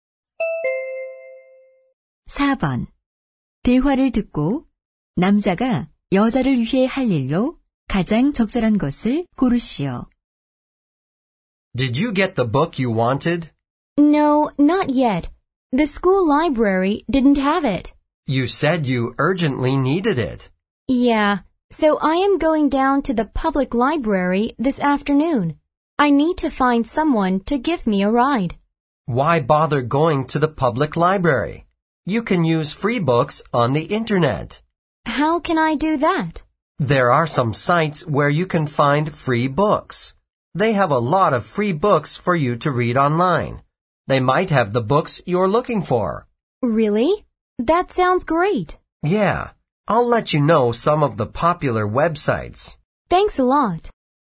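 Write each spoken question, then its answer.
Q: 대화를 듣고 남자가 여자를 위해 할 일로 가장 적절한 것을 고르시오.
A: 무료 책 웹사이트 알려주기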